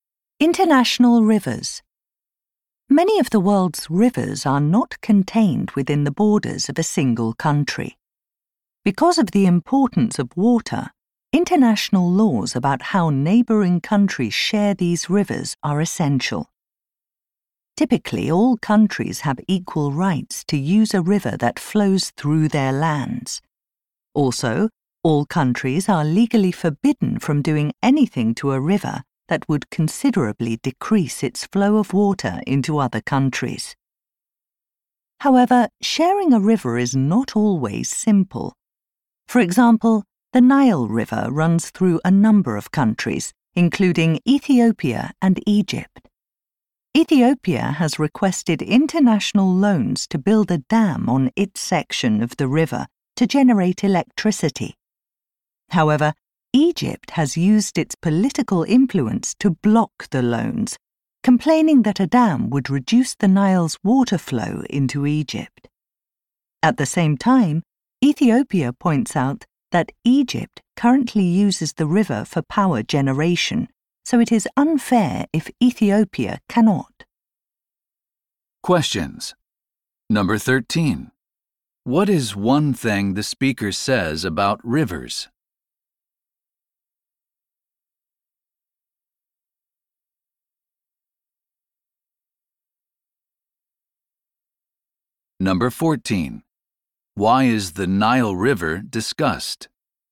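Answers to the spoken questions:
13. Countries are legally forbidden from considerably reducing a river's flow into other countries.
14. To show that sharing a river is not always simple, as with Ethiopia's dam plan and Egypt's objection.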